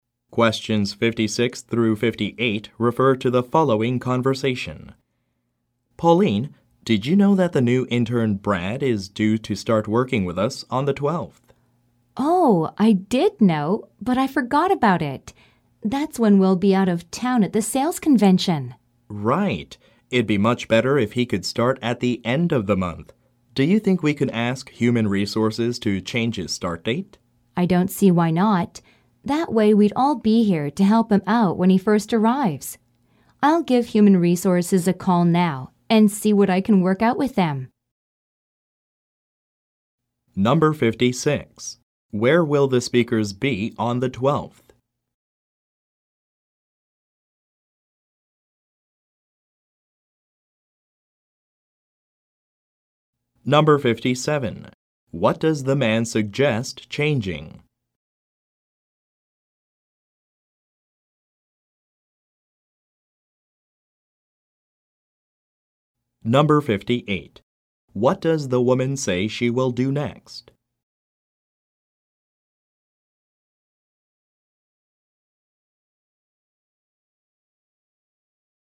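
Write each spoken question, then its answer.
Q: Where will the speakers be on the 12th?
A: At a sales convention out of town

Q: What does the man suggest changing?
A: The intern's start date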